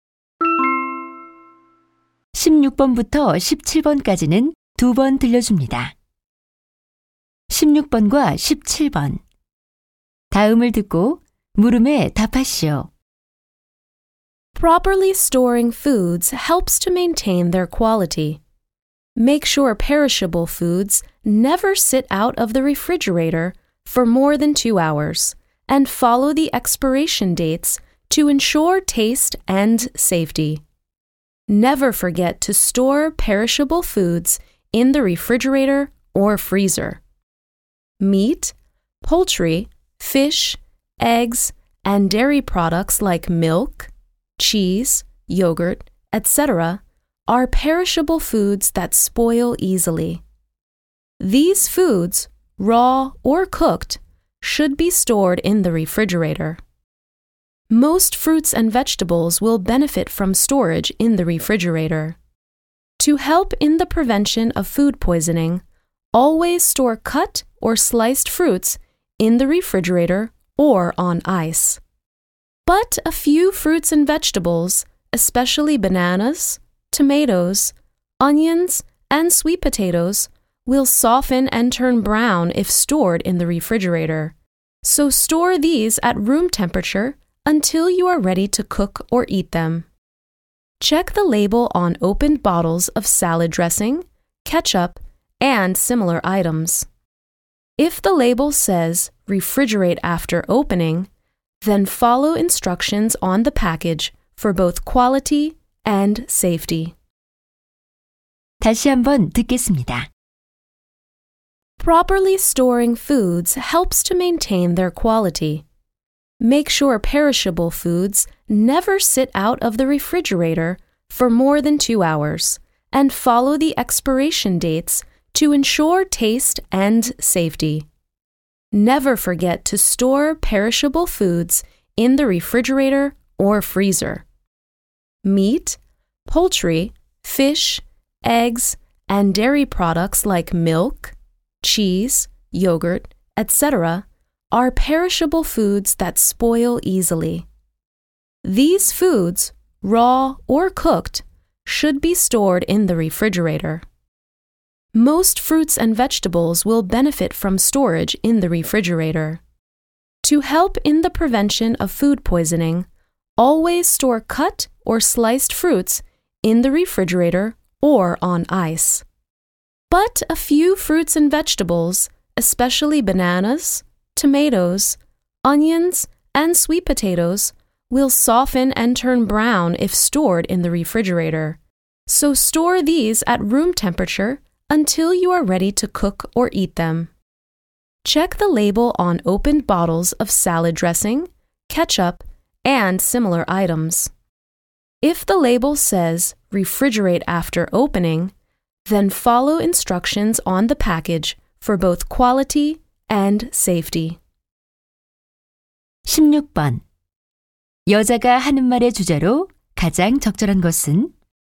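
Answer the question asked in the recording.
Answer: 음식을 올바르게 보관하는 방법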